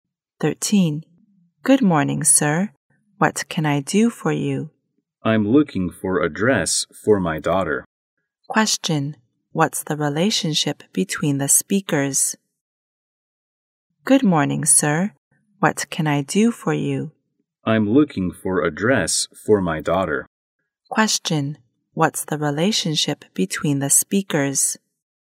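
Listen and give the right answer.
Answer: Shop assistant and customer.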